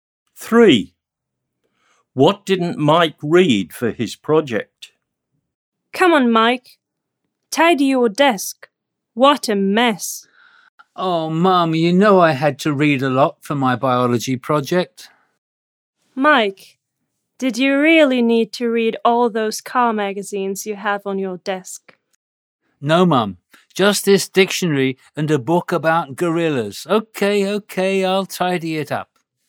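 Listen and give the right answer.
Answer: Car magazines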